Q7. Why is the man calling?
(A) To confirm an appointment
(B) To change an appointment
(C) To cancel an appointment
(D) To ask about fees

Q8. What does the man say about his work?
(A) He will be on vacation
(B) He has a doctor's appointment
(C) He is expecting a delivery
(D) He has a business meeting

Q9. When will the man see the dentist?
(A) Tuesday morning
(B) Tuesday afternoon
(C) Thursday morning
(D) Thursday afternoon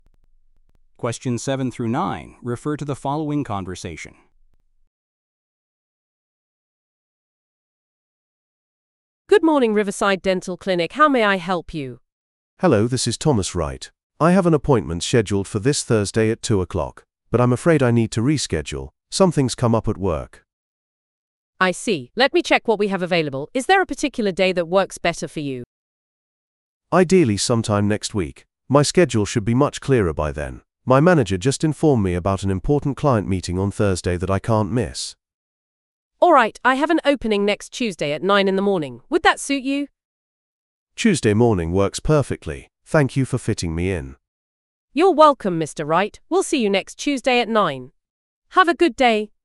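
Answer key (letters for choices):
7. B
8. D
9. A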